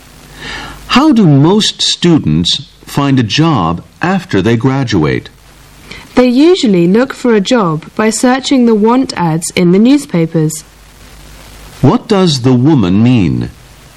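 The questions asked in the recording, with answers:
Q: What does the woman mean?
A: Most students find jobs by searching the want ads in newspapers.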